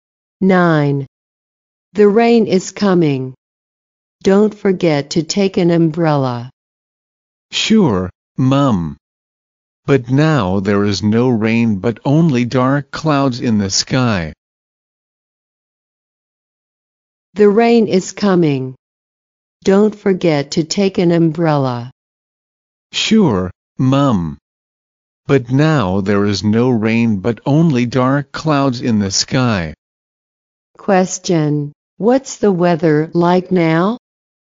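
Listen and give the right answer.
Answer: Cloudy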